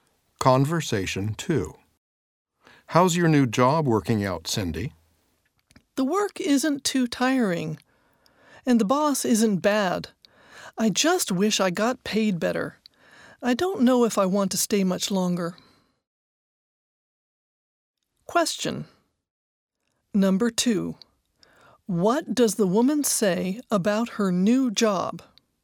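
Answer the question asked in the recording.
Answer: She wishes she were paid better.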